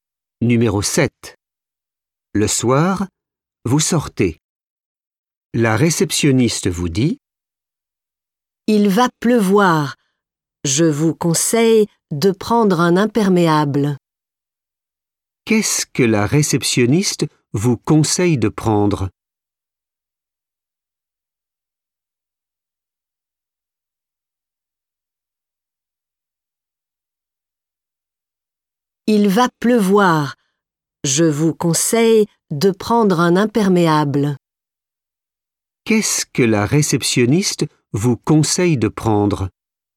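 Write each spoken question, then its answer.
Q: Qu'est-ce que la réceptionniste vous conseille de prendre?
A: Un imperméable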